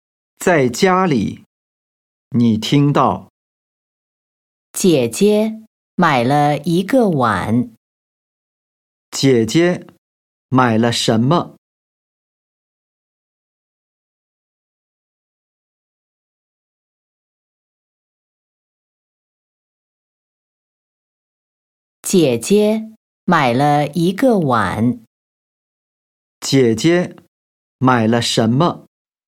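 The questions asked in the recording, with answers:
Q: 姐姐买了什么?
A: 一个碗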